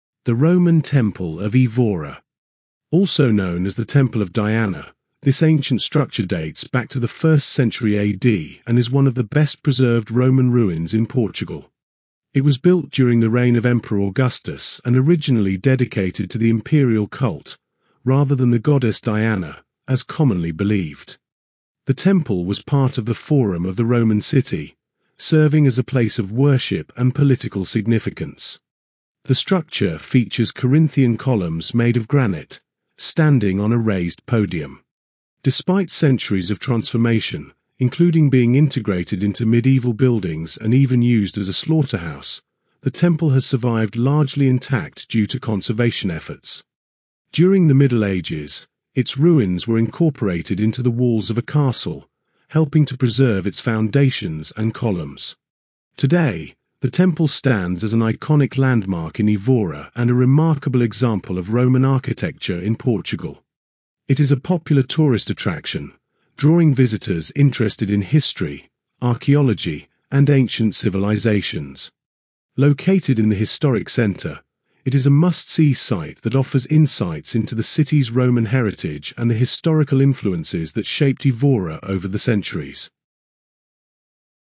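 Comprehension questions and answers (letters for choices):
Listen to the recording and answer the questions.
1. When was the Roman Temple of Évora built?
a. 5th century AD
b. 1st century AD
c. 3rd century BC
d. 10th century AD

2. Who was the Roman Temple of Évora originally dedicated to?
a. The goddess Diana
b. The Emperor Augustus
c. The Roman Senate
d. The god Jupiter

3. What type of columns does the temple feature?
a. Doric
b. Ionic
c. Corinthian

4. What material were the temple's columns made of?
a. Marble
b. Limestone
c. Granite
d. Sandstone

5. Which of the following statements is TRUE about the Roman Temple of Évora?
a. It was never repurposed after the fall of the Roman Empire.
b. It was used as a medieval castle in its entirety.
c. It was integrated into medieval buildings and even used as a slaughterhouse.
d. It was completely rebuilt in the 20th century.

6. How has the temple managed to survive largely intact?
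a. It was buried underground for centuries.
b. It was continuously used as a religious site.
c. It was protected by the castle walls during the Middle Ages.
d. It was moved to a museum for conservation.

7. Why is the Roman Temple of Évora an important historical site today?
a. It is the oldest Roman structure in Portugal.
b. It showcases well-preserved Roman architecture and history.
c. It is the only Roman temple still in use as a religious site.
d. It was the site of the first Roman emperor's coronation.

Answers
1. b
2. b
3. c
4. c
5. c
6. c
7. b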